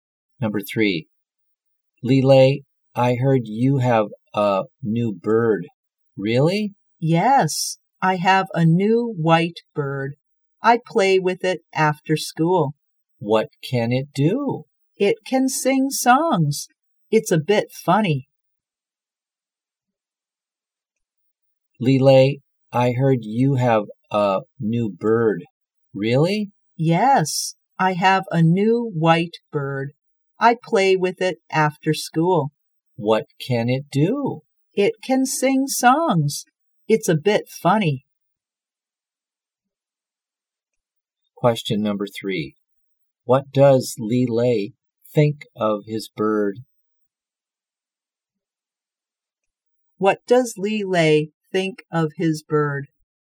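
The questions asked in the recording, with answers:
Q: What does Lele think of his bird?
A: It's a bit funny.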